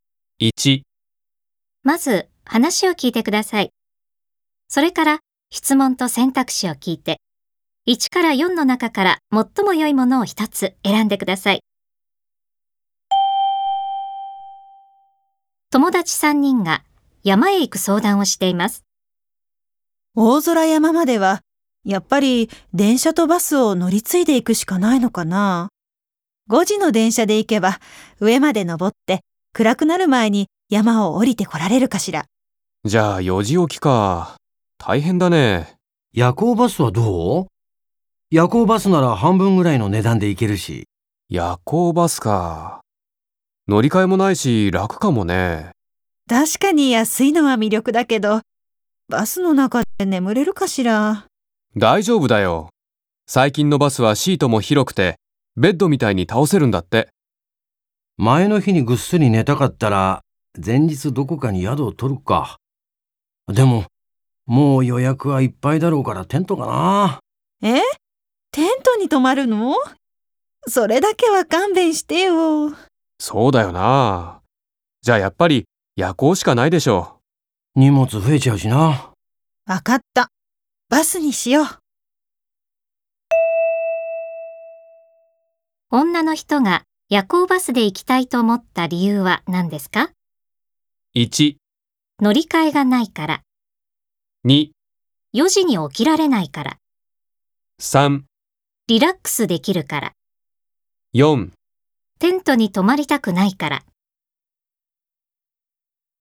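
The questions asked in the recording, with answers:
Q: 女の人が夜行バスで行きたいと思った理由は何ですか?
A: 4: テントに泊まりたくないから。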